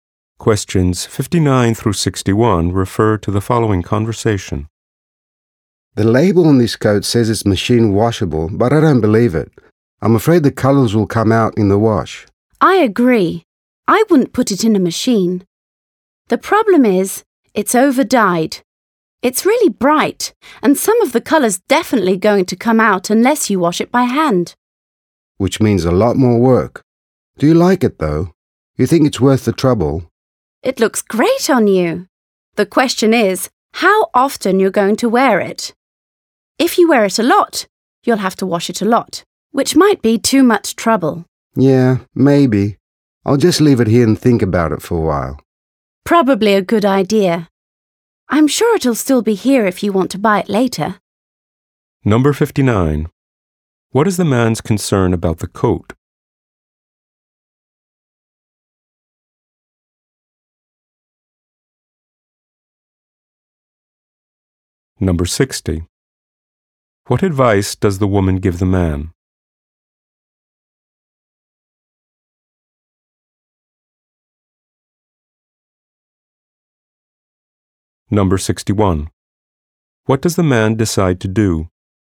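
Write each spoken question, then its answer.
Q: What is the man's concern about the coat?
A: The colours will come out in the wash

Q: What does the man decide to do?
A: Think about it and maybe buy it later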